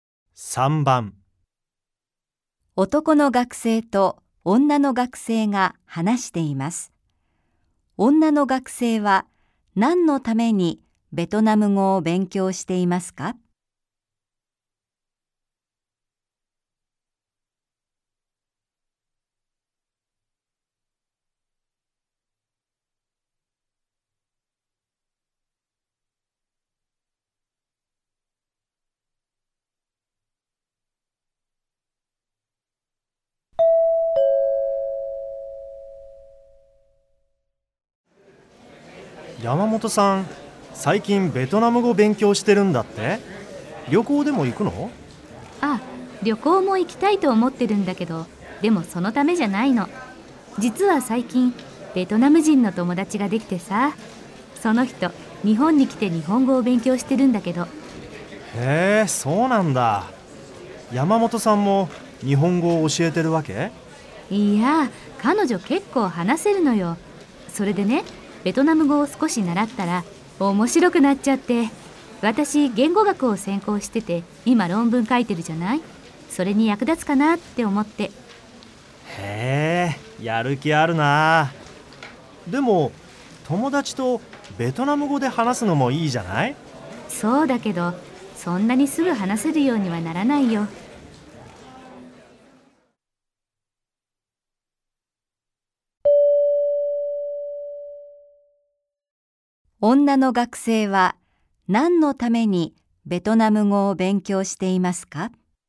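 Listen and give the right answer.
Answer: 言語学の論文に役立てるため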